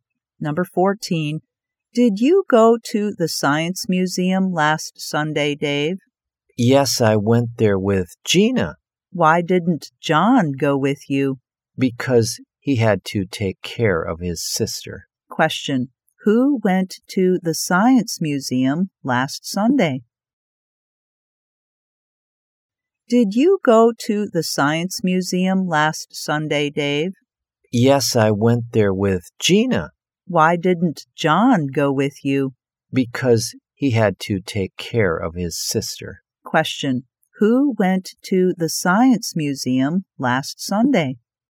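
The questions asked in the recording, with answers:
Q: who went to the Science Museum last Sunday?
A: Dave and Gina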